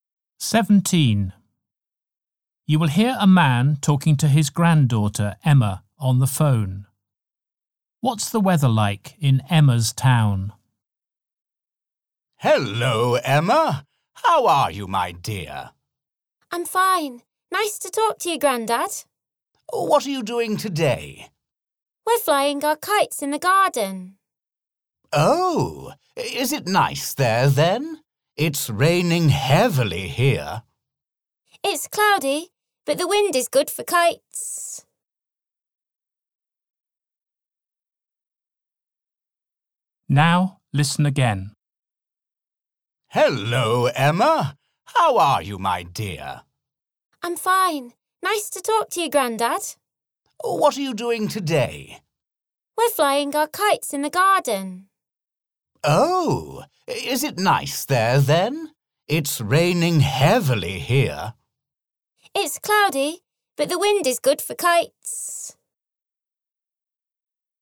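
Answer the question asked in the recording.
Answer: Cloudy and windy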